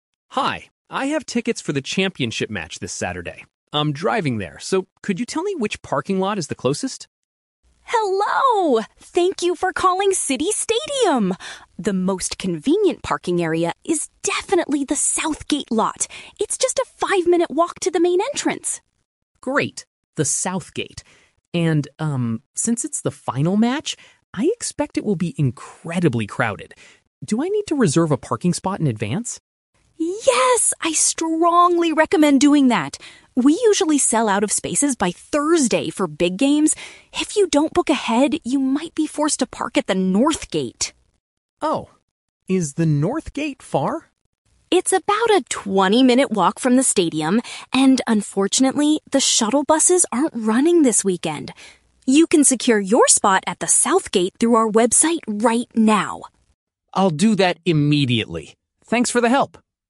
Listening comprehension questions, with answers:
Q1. Where is the most convenient place for the customer to leave his car?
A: In the parking zone located near the South Gate.

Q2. Why does the operator advise the customer to book a parking spot early?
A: Because the parking area will likely be completely full soon.

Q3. What is the disadvantage of parking at the North Gate this weekend?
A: It requires a long walk without any public transport support.

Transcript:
Customer: Hi, I have tickets for the championship match this Saturday. I'm driving there, so could you tell me which parking lot is the closest?
Operator: Hello! Thank you for calling City Stadium. The most convenient parking area is definitely the South Gate lot. It's just a five-minute walk to the main entrance.
And, um, since it's the final match, I expect it will be incredibly crowded. Do I need to reserve a parking spot in advance?
Operator: Yes, I strongly recommend doing that. We usually sell out of spaces by Thursday for big games. If you don't book ahead, you might be forced to park at the North Gate.
Customer: Oh, is the North Gate far?
Operator: It's about a twenty-minute walk from the stadium, and unfortunately, the shuttle buses aren't running this weekend. You can secure your spot at the South Gate through our website right now.